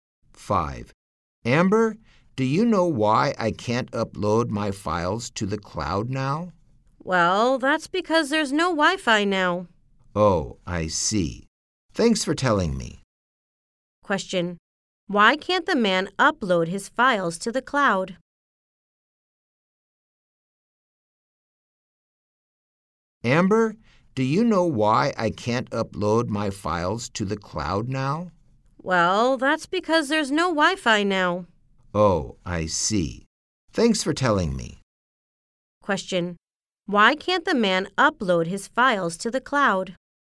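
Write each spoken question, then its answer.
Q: Why can't the man upload his files to the cloud?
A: Because there is no Wi-Fi now.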